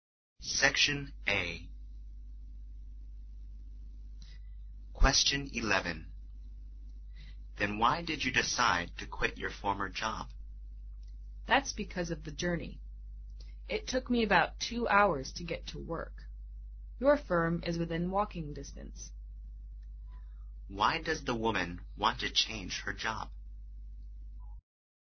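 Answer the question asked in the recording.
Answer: It took about 2 hours to get to work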